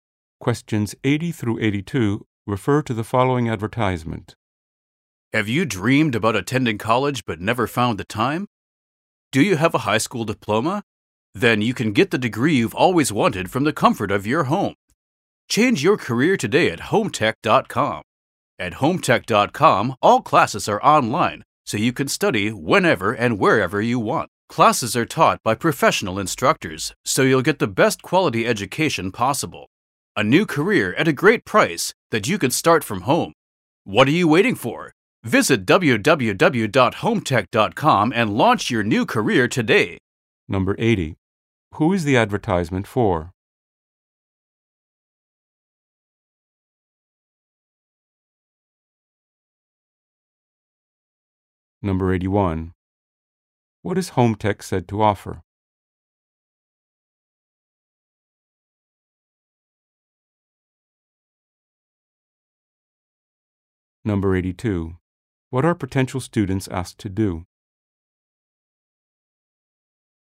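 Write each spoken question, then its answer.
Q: Who is the advertisement for?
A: High school graduates who want a college degree

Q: What is Home Tech said to offer?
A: Online classes taught by professional instructors

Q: What are potential students asked to do?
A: Visit the website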